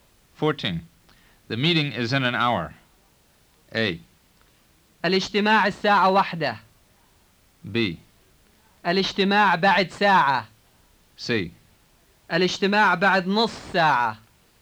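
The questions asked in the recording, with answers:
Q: The meeting is in an hour.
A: B: الاجتماع بعد ساعة.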